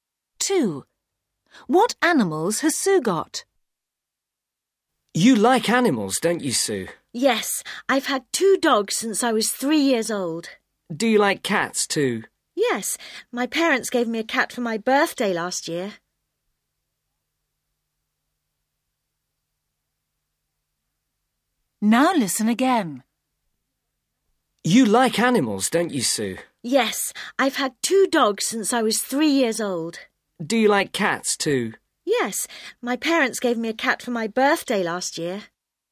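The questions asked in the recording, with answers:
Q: What animals has Sue got?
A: Two dogs and a cat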